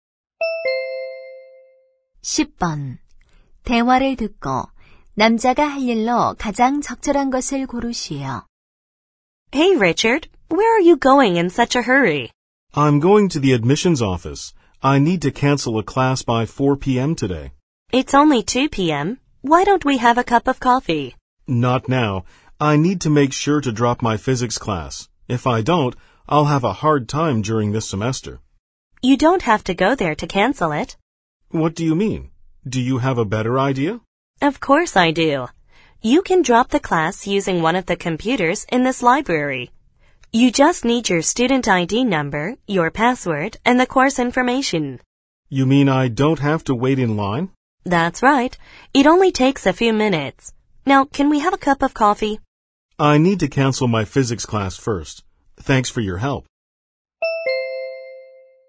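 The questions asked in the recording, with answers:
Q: 대화를 듣고 남자가 할 일로 가장 적절한 것을 고르시오.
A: 도서관 컴퓨터로 물리 수업 취소하기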